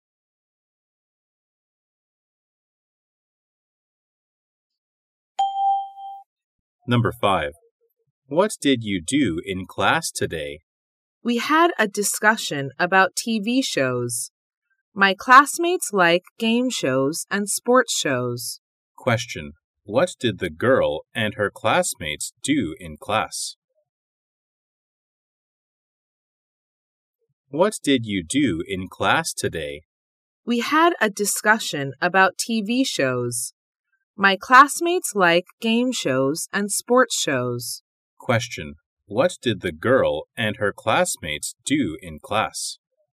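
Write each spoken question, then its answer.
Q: What did the girl and her classmates do in class?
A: They had a discussion about TV shows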